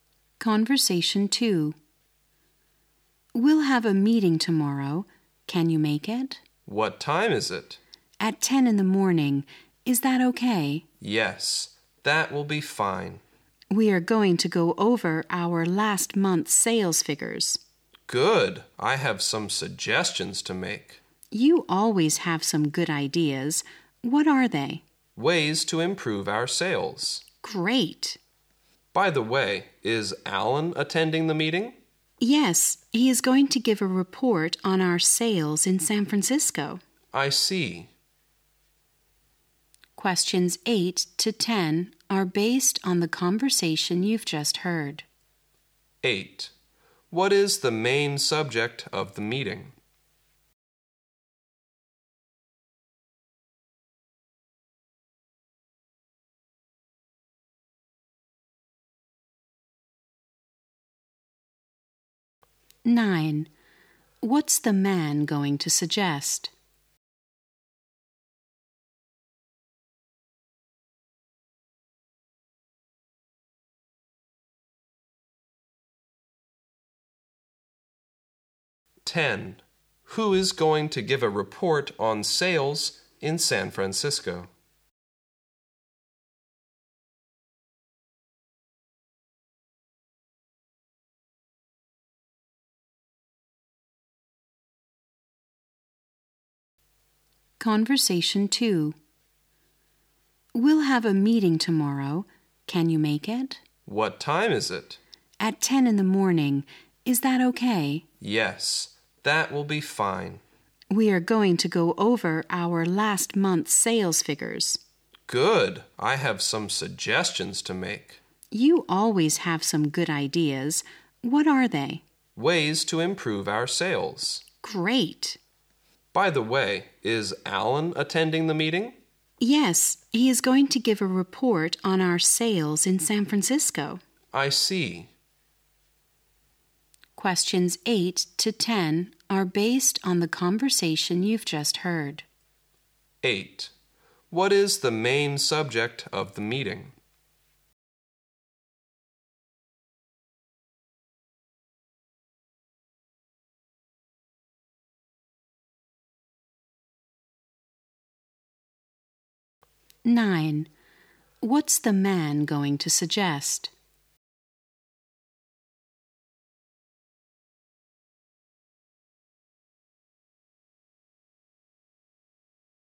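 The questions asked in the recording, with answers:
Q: 8. What is the main subject of the meeting?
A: Last month's sales figures

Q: Nine. What's the man going to suggest?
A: Ways to improve their sales

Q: Ten. Who is going to give a report on sales in San Francisco?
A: Alan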